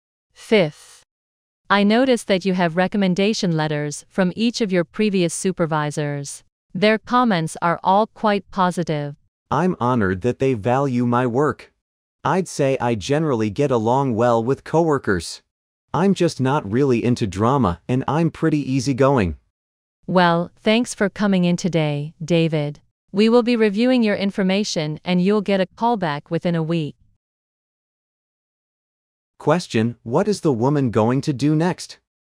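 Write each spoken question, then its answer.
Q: What is the woman going to do next?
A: Review David's information and call him back within a week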